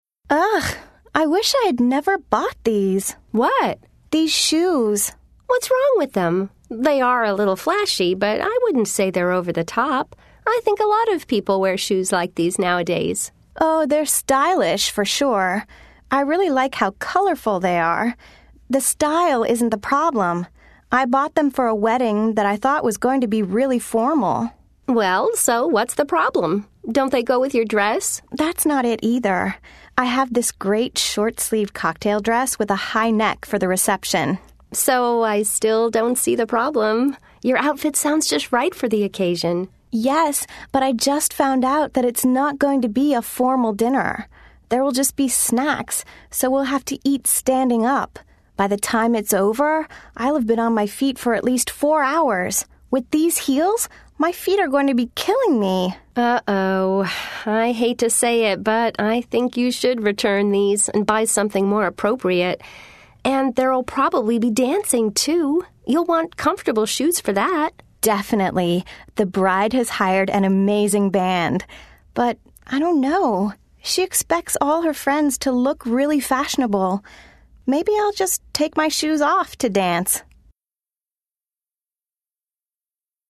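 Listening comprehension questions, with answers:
Listen to the conversation. Then circle the answer that correctly completes each sentence.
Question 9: Giselle thinks Fiona's shoes are ..........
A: a little flashy but not over the top

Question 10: Fiona thinks her shoes are ...........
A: stylish and colorful but uncomfortable

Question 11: The wedding reception is going to be ...........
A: informal, with snacks eaten standing up

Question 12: Fiona's dress is...........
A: a short-sleeved cocktail dress with a high neck

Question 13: Giselle thinks that Fiona should ...........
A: return the shoes and buy something more appropriate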